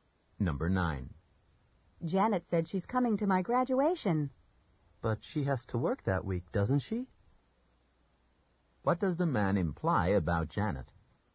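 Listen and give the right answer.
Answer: She may not be able to come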